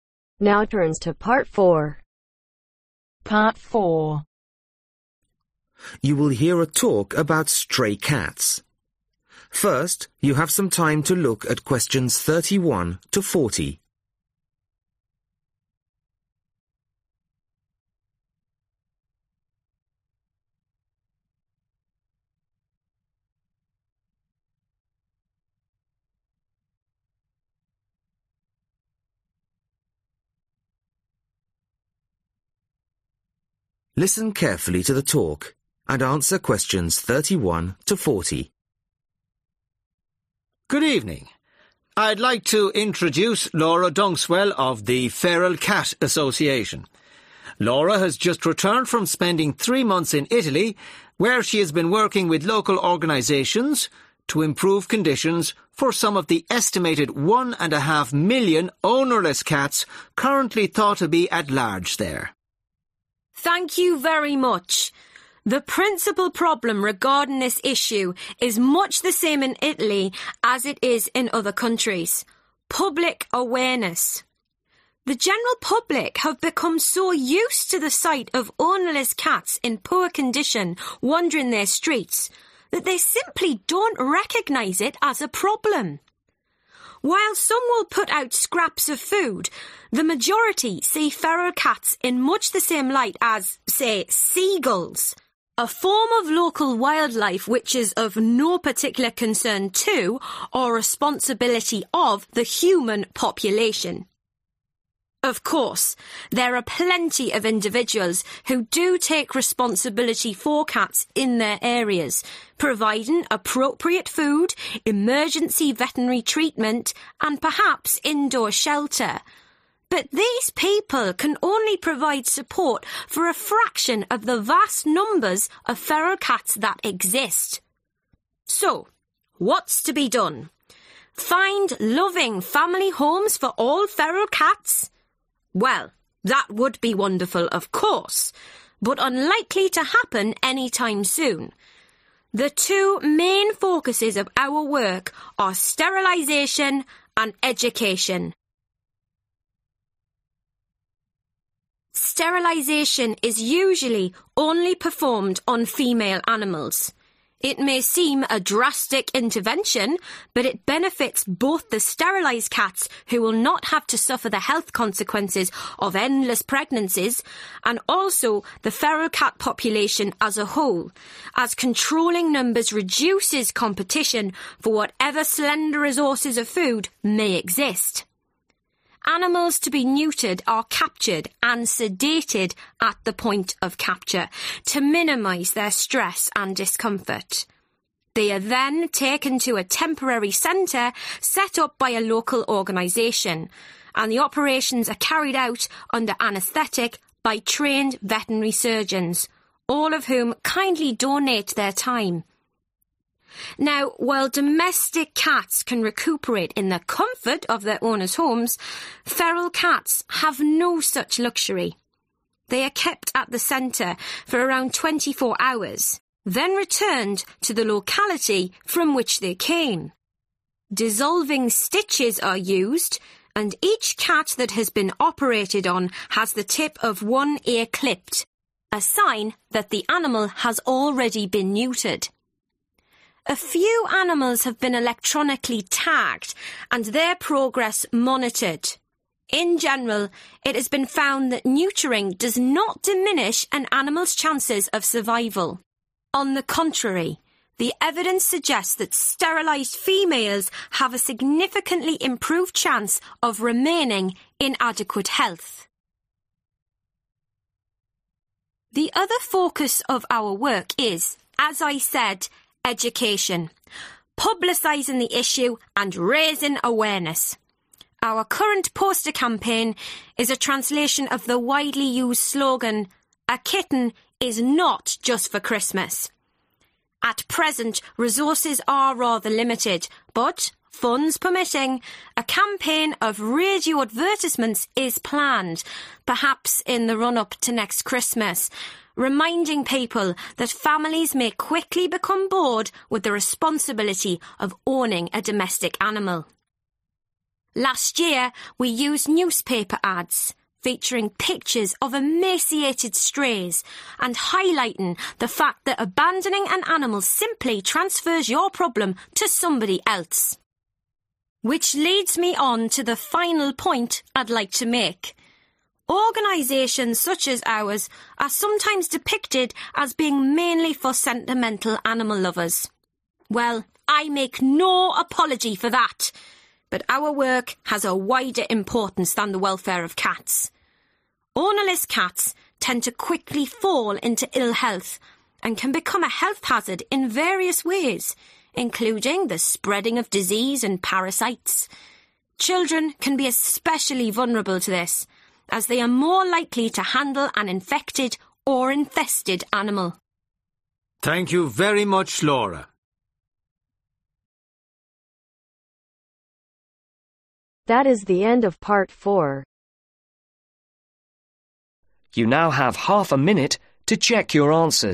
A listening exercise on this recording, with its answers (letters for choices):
Choose the correct letters A , B or C.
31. The main problem is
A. cats in towns.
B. the poor condition of feral cats.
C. public awareness.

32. Emergency veterinary treatment is provided by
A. the government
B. a small number of people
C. nobody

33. Sterilization is usually performed only on females ............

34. Sterilization is carried out in ............ centres.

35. Cats remain there for about approximately twenty four .............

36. To show that an animal has been sterilized, one ear is ............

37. A kitten is not just for (37)............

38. (38)............ Ads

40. A wider problem of feral cats is that they can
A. injure children.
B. damage human health.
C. become infested with parasites.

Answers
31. C
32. B
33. Animals/Cats
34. Temporary
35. Hours
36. Clipped
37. Christmas
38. Radio
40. B